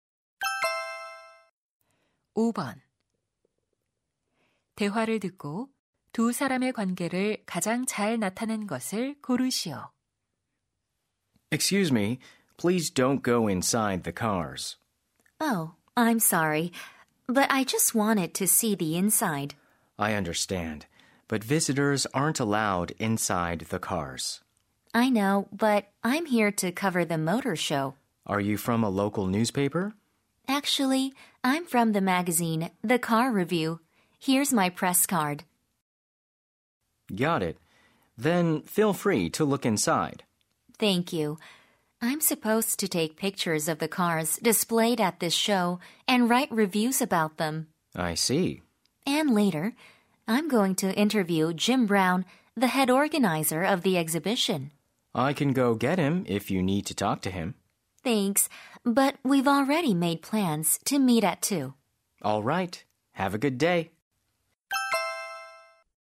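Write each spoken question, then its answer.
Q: 대화를 듣고 두 사람의 관계를 가장 잘 나타낸 것을 고르시오.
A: 모터쇼 전시장 직원 - 자동차 잡지 기자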